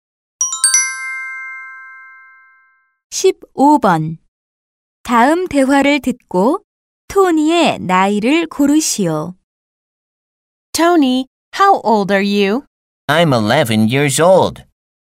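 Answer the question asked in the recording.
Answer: 11살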